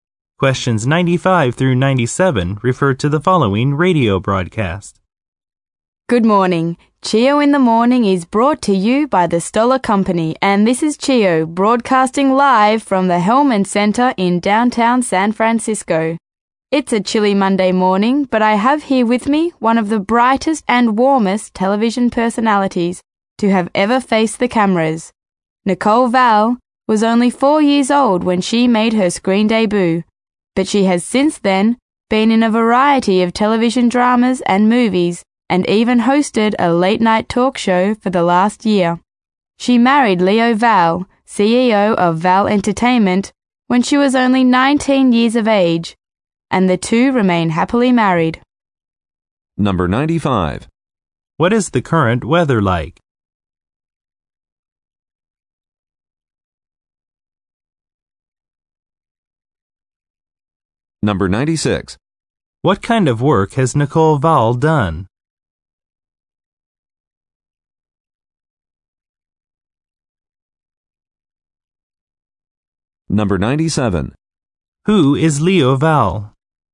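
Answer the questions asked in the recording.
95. Chilly
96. Acting in TV dramas and movies, and hosting a late-night talk show
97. Nicole Val's husband, CEO of Val Entertainment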